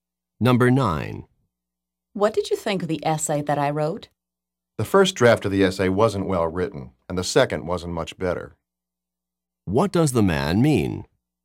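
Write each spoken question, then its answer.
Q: What does the man mean?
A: Both drafts were poorly written.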